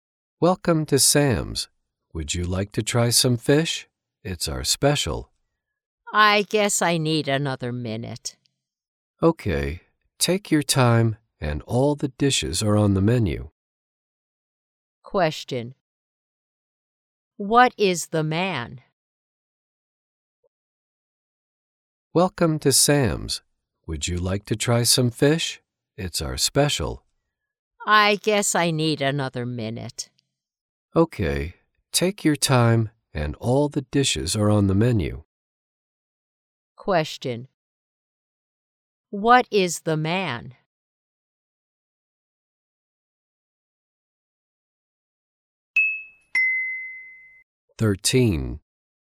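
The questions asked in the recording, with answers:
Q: What is the man?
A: A waiter.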